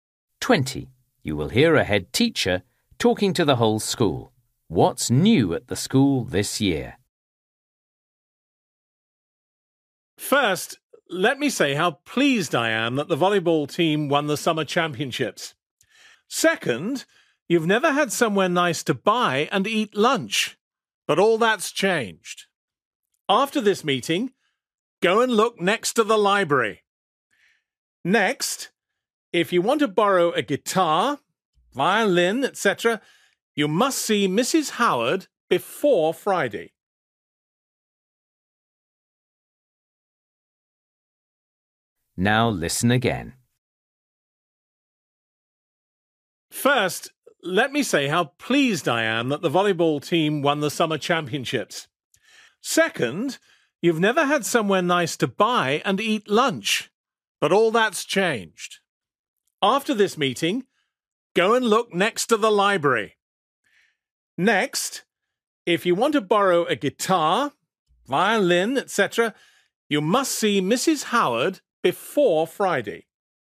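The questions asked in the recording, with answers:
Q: What's new at the school this year?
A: A place to buy and eat lunch (café next to the library)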